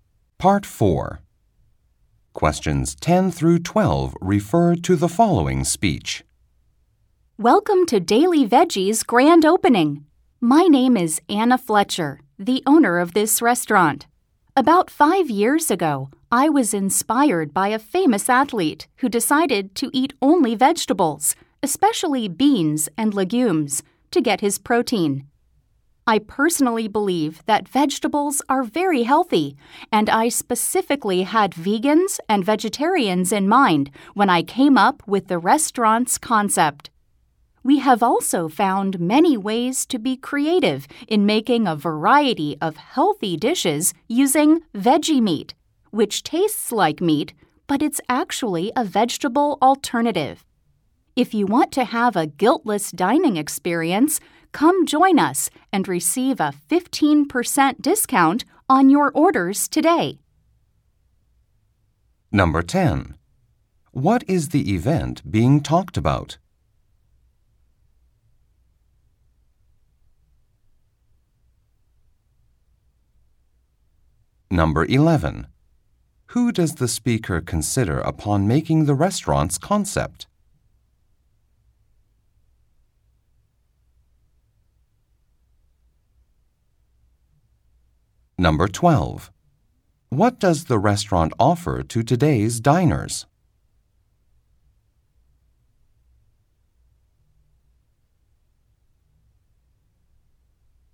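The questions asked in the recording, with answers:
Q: What is the event being talked about?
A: A restaurant's grand opening

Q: Who does the speaker consider upon making the restaurant's concept?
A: Vegans and vegetarians

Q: What does the restaurant offer to today's diners?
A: A 15% discount on orders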